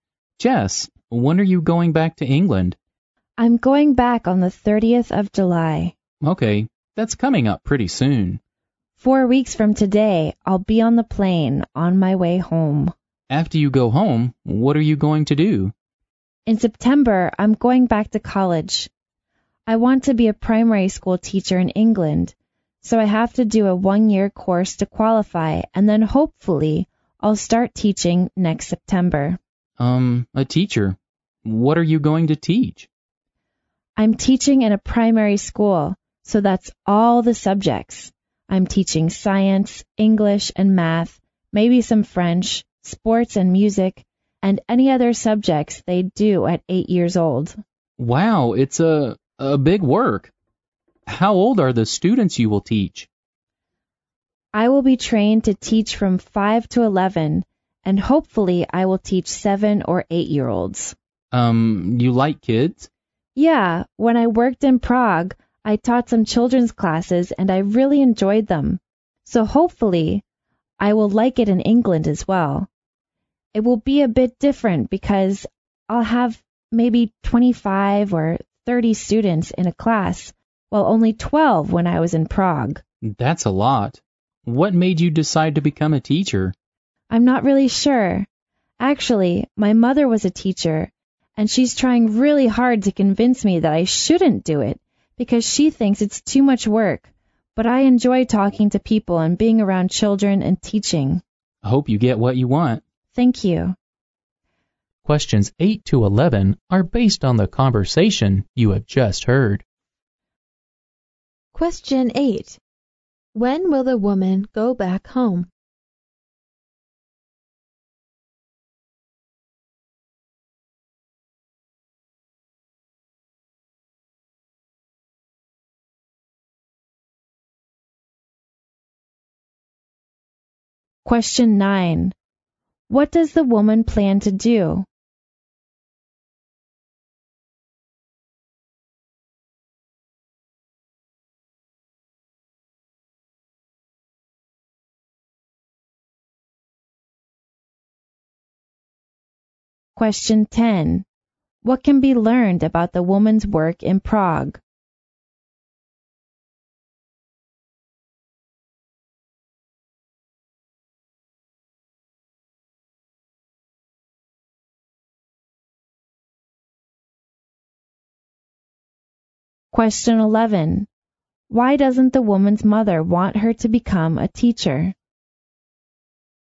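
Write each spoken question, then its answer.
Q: When will the woman go back home?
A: On the 30th of July

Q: What does the woman plan to do?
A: Go back to college for a one-year course to become a primary school teacher

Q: What can be learned about the woman's work in Prague?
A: She taught children's classes of about 12 students and enjoyed it

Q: Why doesn't the woman's mother want her to become a teacher?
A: She thinks it's too much work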